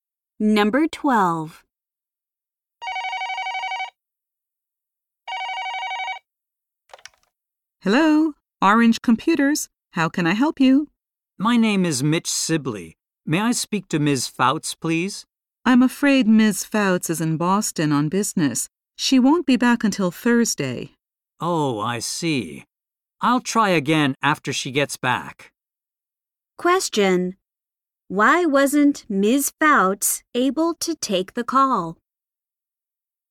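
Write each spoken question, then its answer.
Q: Why wasn't Ms. Fouts able to take the call?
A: She is in Boston on business.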